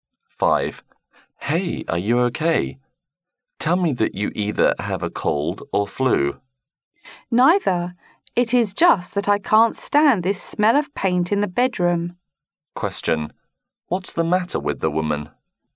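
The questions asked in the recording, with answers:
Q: What's the matter with the woman?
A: She can't stand the smell of paint in the bedroom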